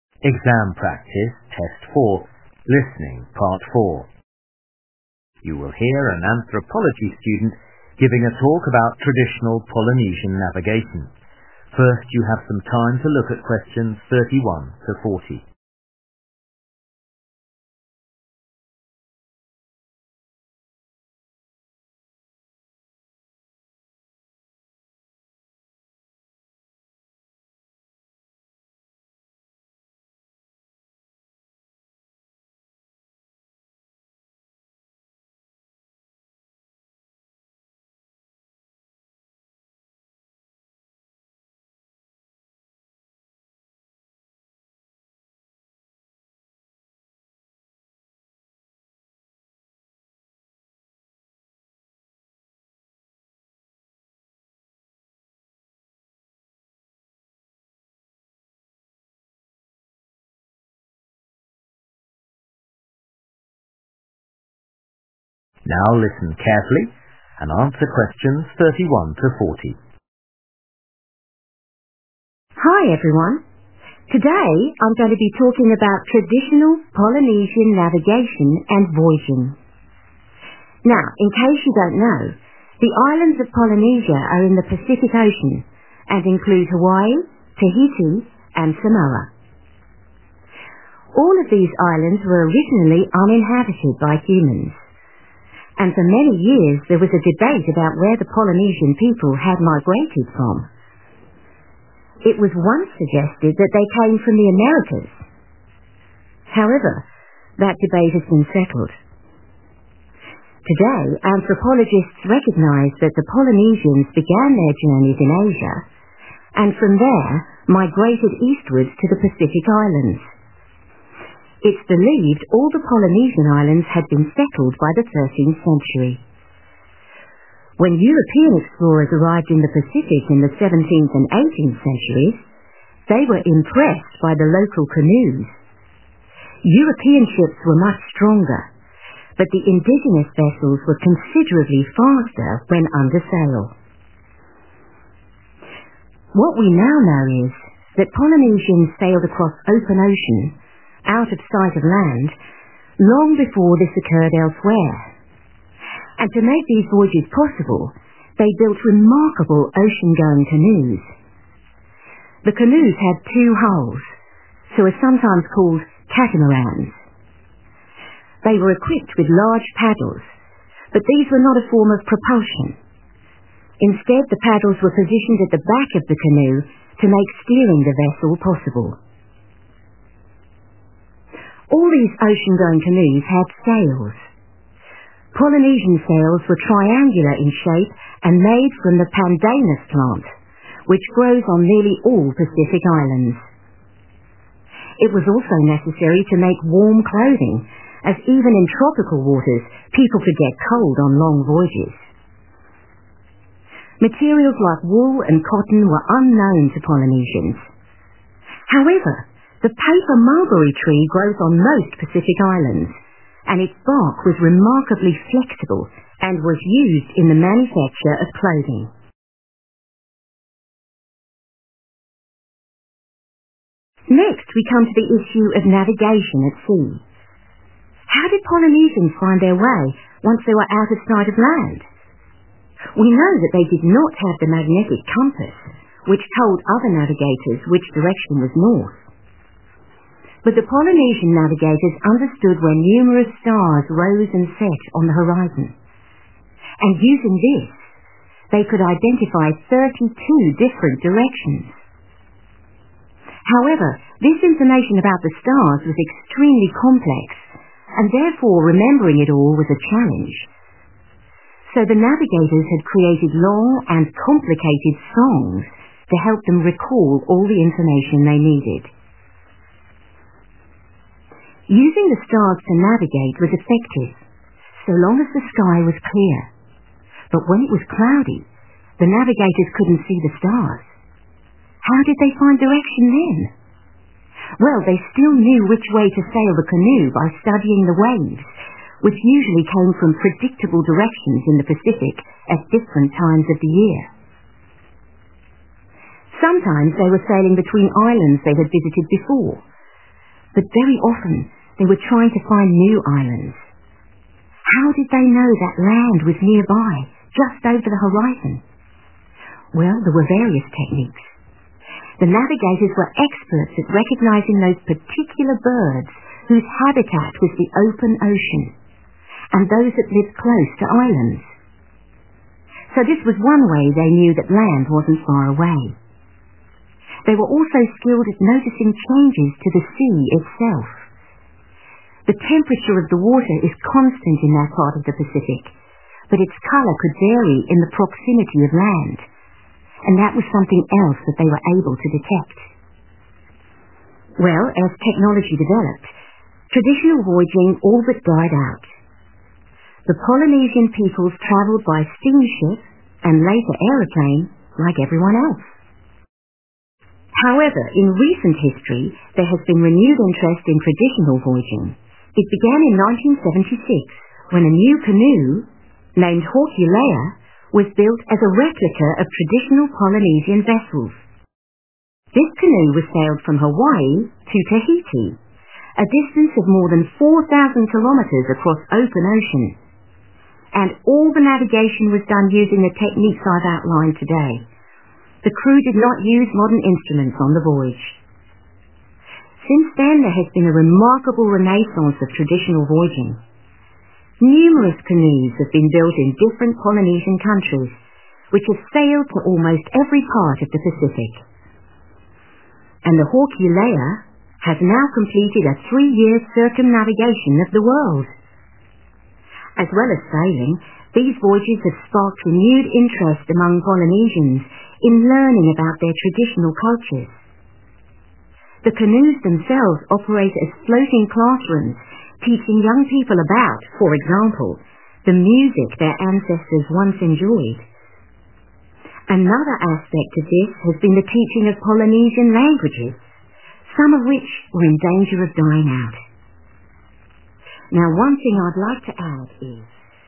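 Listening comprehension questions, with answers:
Questions 31-40. Complete the notes below. Write ONE WORD ONLY for each answer.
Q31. the Polynesian peoples originally migrated from 31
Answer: Asia

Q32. European explorers were impressed that Polynesian canoes were 32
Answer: faster

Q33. paddles were use for 33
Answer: steering

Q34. warm clothes were made from 34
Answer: bark

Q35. they remembered where stars rose and set by making up detailed 35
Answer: songs

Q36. when it was cloudy, they found the direction by using 36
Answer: waves

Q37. they could identify certain 37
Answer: birds

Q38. close to land, they could read changes in the sea's 38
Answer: colour

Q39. in 1967 the canoe Hokule'a sailed from Hawaii to Tahiti without 39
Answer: instruments

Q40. as well as sailing, these voyages have created fresh interest in Polynesian culture, music and 40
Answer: languages

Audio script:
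Student: Hi everyone. Today I'm going to be talking about traditional Polynesian navigation and voyaging. Now, in case you don't know, the islands of Polynesia are in the Pacific Ocean and include Hawaii, Tahiti and Samoa.
All of these islands were originally uninhabited by humans. And for many years there was a debate about where the Polynesian people had migrated from. It was once suggested that they came from the Americas. (Q31) However, that debate has been settled. Today, anthropologists recognise that the Polynesians began their journeys in Asia and from there migrated eastwards to the Pacific islands. It's believed all the Polynesian islands had been settled by the 13th century. (Q32) When European explorers arrived in the Pacific in the 17th and 18th centuries, they were impressed by the local canoes. European ships were much stronger, but the indigenous vessels were considerably faster when under sail.
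What we now know is that Polynesians sailed across the open ocean – out of sight of land – long before this occurred elsewhere. And to make these voyages possible, they built remarkable ocean-going canoes. The canoes had two hulls – so they are sometimes called 'catamarans'. (Q33) They were equipped with large paddles, but these were not a form of propulsion. Instead the paddles were positioned at the back of the canoe to make steering the vessel possible.
All these ocean-going canoes had sails. Polynesian sails were triangular in shape and made from the 'pandanus' plant, which grows on nearly all Pacific islands. It was also necessary to make warm clothing, as even in tropical waters people could get cold on long voyages. Materials like wool and cotton were unknown to Polynesians.
Next we come to the issue of navigation at sea. How did Polynesians find their way, once they were out of sight of land? 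We know that they did not have the magnetic compass, which told other navigators which direction was north. But the Polynesian navigators understood where numerous stars rose and set on the horizon. And using this, they could identify 32 different directions. (Q35) However, this information about the stars was extremely complex and therefore remembering it all was a challenge. So the navigators had created (=making up) long and complicated songs to help them recall (=remember) all the information they needed.
Using the stars to navigate was effective – so long as the sky was clear. But when it was cloudy, the navigators couldn't see the stars. (Q36) How did they find direction then? Well, they still knew which way (=found the directions) to sail the canoe by studying the waves, which usually came from predictable directions in the Pacific at different times of the year.
Sometimes they were sailing between islands they had visited before. 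But very often they were trying to find new islands. How did they know that land was nearby, just over the horizon? (Q37) Well, there were various techniques. The navigators were experts at recognising (=identify) those particular birds whose habitat was the open ocean, and those that lived close to islands (Vâng, có nhiều kỹ thuật khác nhau. So this was one way they knew that land wasn't far away. They were also skilled at noticing changes to the sea itself. (Q38) The temperature of the water is constant in that part of the Pacific but its color could vary in the proximity of land, and that was something else that they were able to detect (=read).
Well, as technology developed, traditional voyaging all but died out. The Polynesian peoples traveled by steam ship and later airplane, like everyone else. However, in recent history, there has been renewed interest in traditional voyaging. (Q39) It began in 1976 when a new canoe named Hokule'a was built as a replica of traditional Polynesian vessels. 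This canoe sailed from Hawaii to Tahiti, a distance of more than 4000 kilometers across the open ocean. Since then there has been a remarkable renaissance of traditional voyaging. Numerous canoes have been built in different Polynesian countries, which have sailed to almost every part of the Pacific. (Q40) And the Hokule'a has now completed a 3-year circumnavigation of the world. As well as sailing, these voyages have sparked renewed interest among Polynesians in learning about their traditional cultures. The canoes themselves operate as floating classrooms teaching young people about, for example, the music their ancestors once enjoyed. Another aspect of this has been the teaching of Polynesian languages, some of which were in danger of dying out (Và Hokule'a hiện đã hoàn thành hành trình vòng quanh thế giới kéo dài 3 năm.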